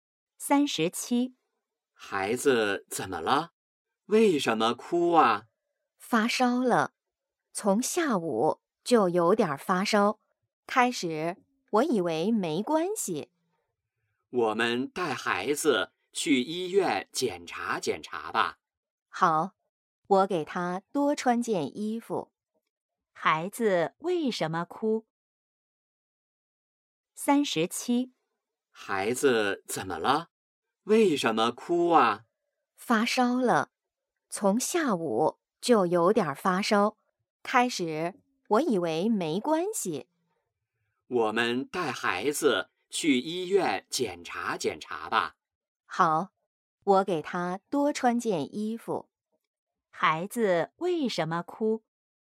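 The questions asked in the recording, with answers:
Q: 孩子为什么哭?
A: 发烧了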